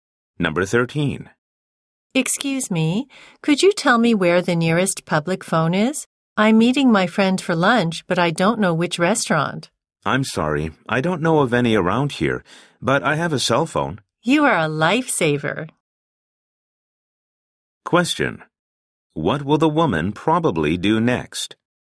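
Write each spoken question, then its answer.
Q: What will the woman probably do next?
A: Use the man's cell phone to call her friend.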